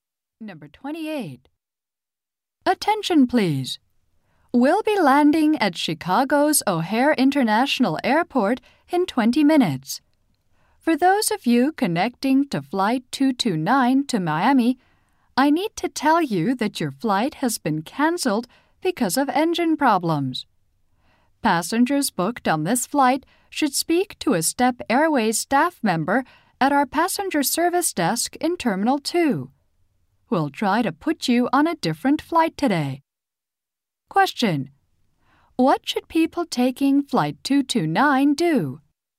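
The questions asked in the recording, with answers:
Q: What should people taking Flight 229 do?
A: Speak to a staff member at the passenger service desk in Terminal 2.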